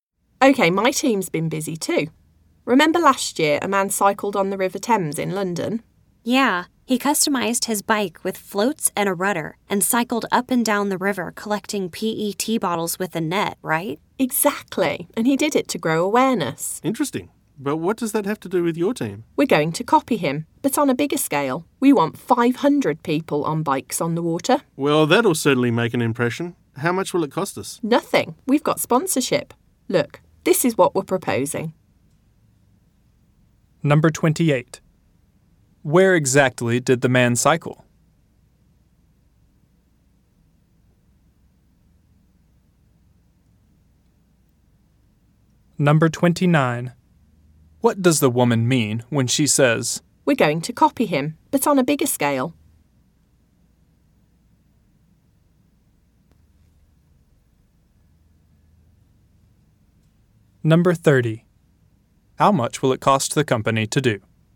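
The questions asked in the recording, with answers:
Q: Where exactly did the man cycle?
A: On the River Thames in London

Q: What does the woman mean when she says, "We're going to copy him, but on a bigger scale"?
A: They want 500 people on bikes on the water

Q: How much will it cost the company to do?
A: Nothing; they have sponsorship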